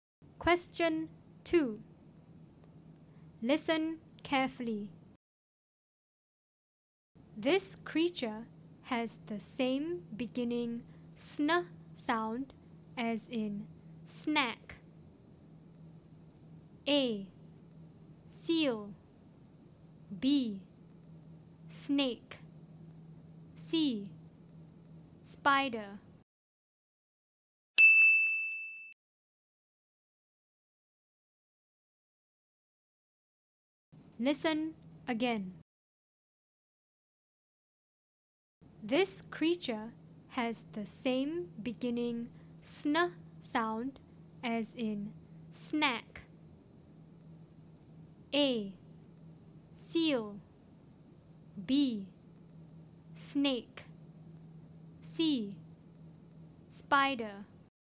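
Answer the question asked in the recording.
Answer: B: Snake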